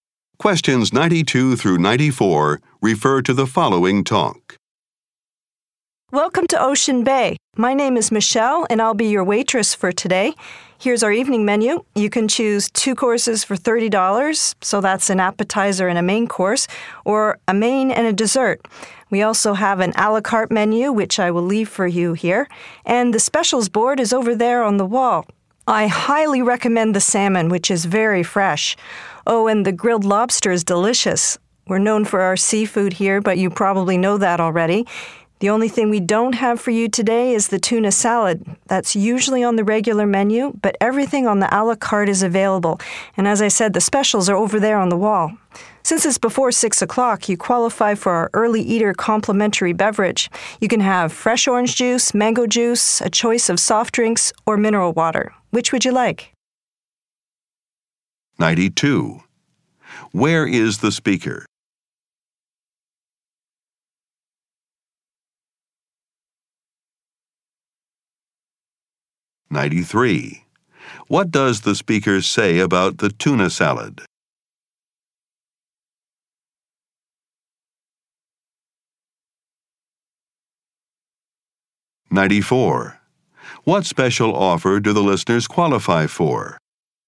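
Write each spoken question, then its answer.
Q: Where is the speaker?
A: In a restaurant

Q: What does the speaker say about the tuna salad?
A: It is not available today

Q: What special offer do the listeners qualify for?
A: A free drink for eating before 6 o'clock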